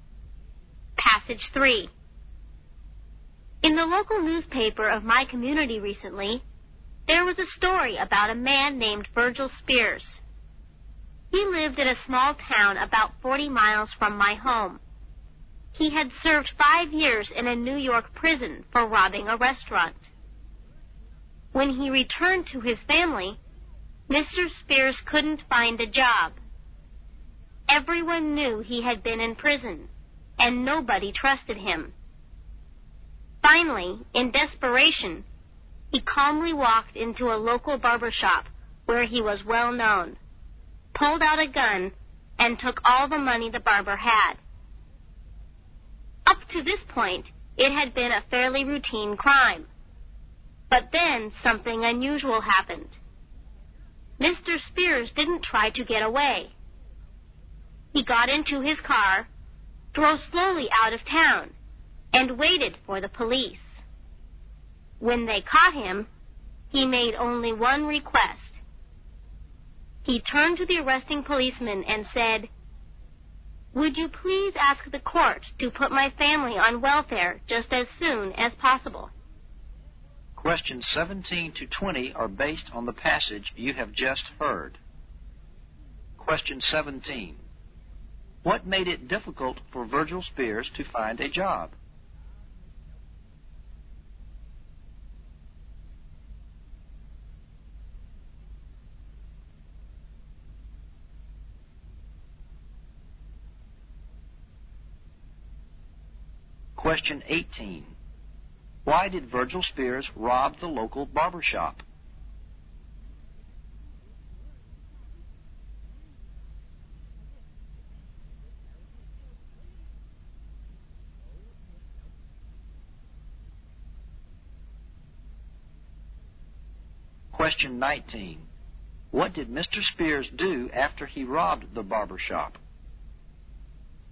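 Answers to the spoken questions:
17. He had been in prison and nobody trusted him
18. He was desperate and wanted his family to be put on welfare
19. He drove slowly out of town and waited for the police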